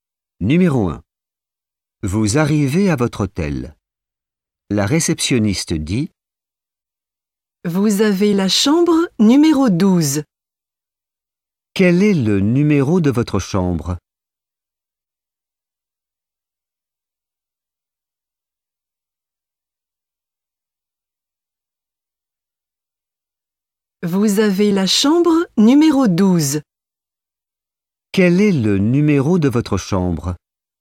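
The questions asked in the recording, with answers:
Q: Quel est le numéro de votre chambre ?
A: 12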